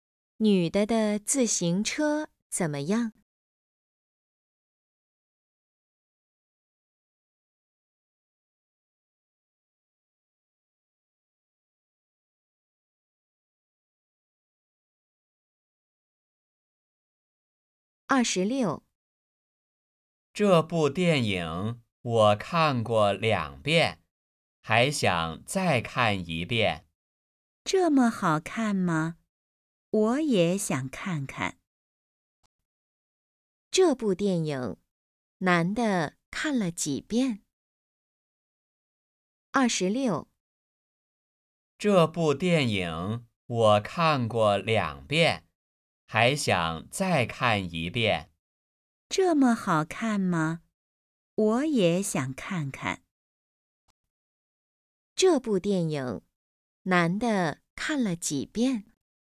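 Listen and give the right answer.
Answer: 两遍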